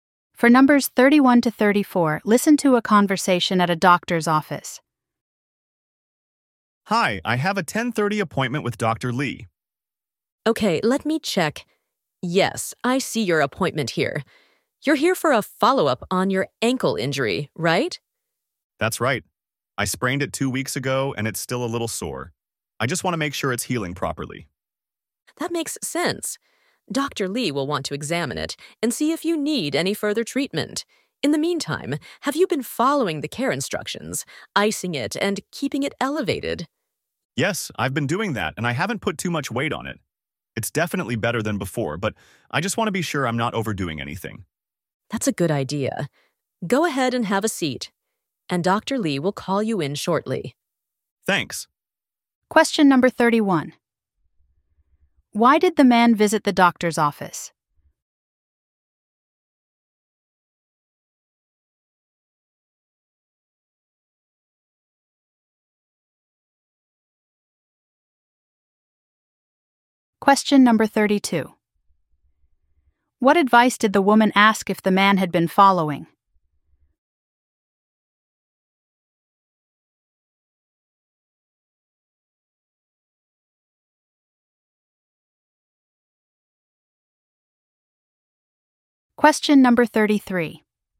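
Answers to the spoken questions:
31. For a follow-up on his ankle injury
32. Icing the ankle and keeping it elevated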